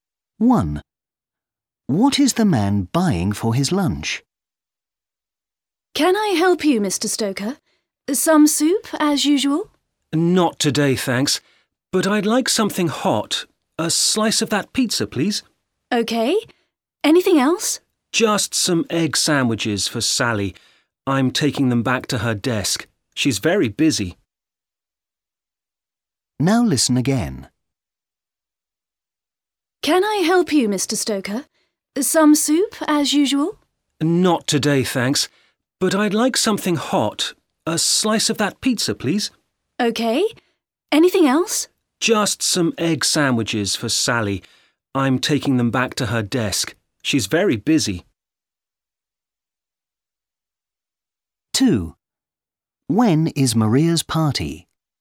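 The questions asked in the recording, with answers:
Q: What is the man buying for his lunch?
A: a slice of pizza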